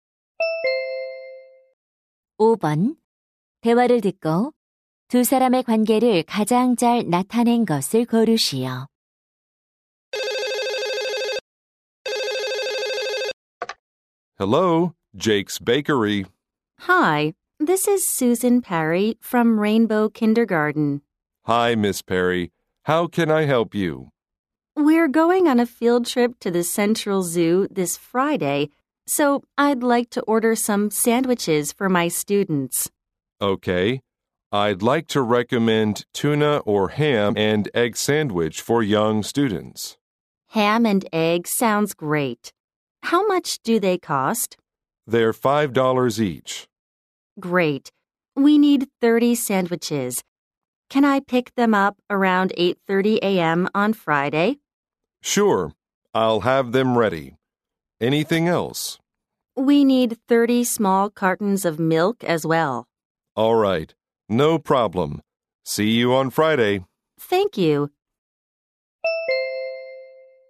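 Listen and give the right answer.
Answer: 제과점 직원 - 유치원 교사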